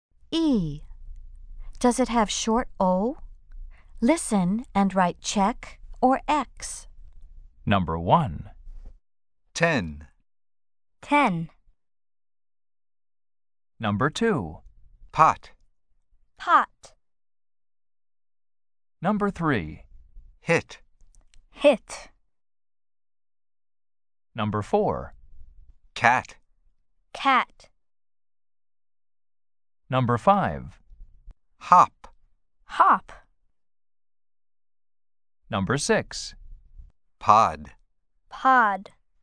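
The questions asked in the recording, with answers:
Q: Does it have short O?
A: Yes (pot)

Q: Does it have short O?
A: No (hit)

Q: Does it have short O?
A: No (cat)

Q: Does it have short O?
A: Yes (hop)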